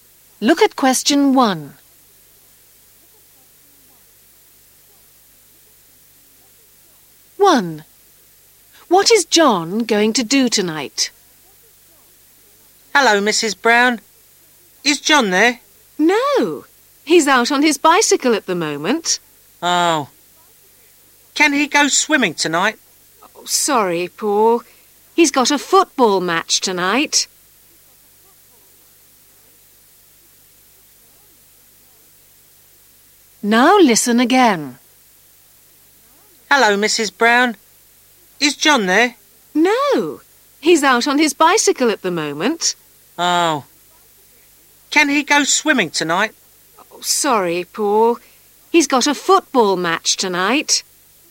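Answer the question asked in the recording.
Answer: play in a football match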